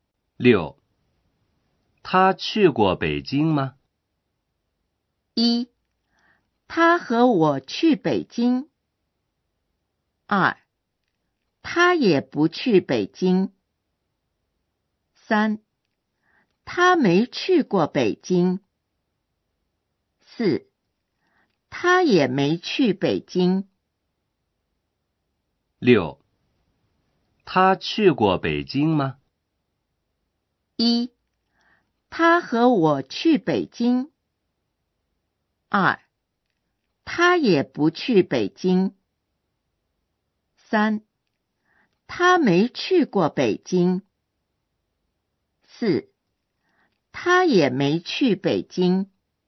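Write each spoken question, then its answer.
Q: 他去过北京吗?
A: 3: 他没去过北京。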